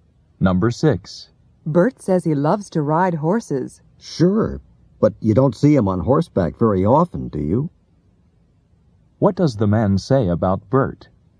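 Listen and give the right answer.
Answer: Bert doesn't ride horses very often.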